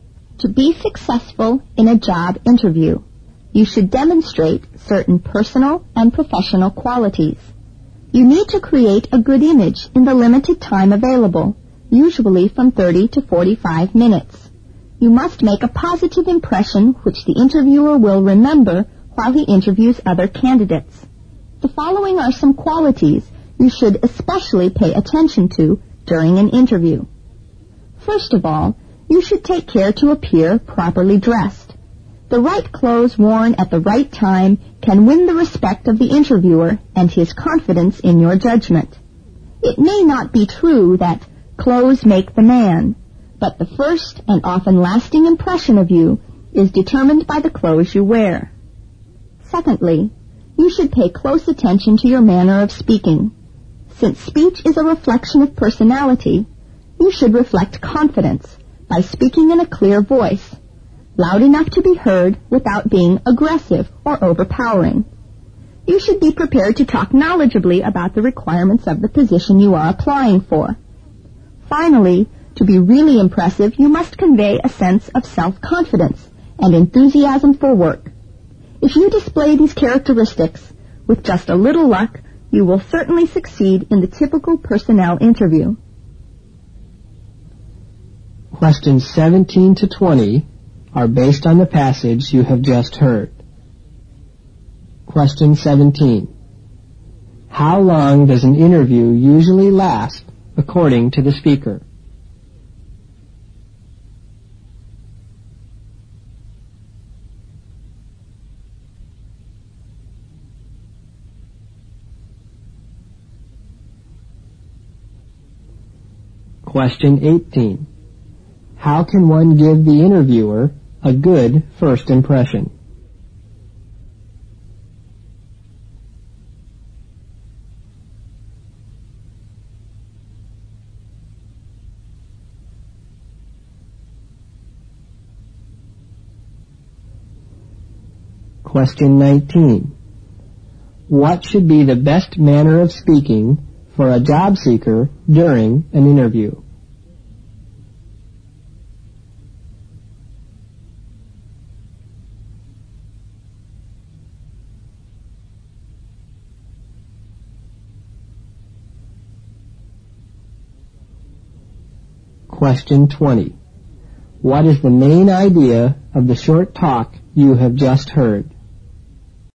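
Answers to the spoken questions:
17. From 30 to 45 minutes
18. By being properly dressed
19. Speaking in a clear voice, loud enough to be heard without being aggressive or overpowering
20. The personal and professional qualities needed to succeed in a job interview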